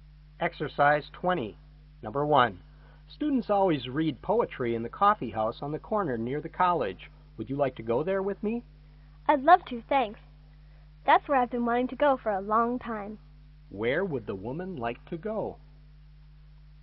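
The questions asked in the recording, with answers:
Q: Where would the woman like to go?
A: The coffee house near the college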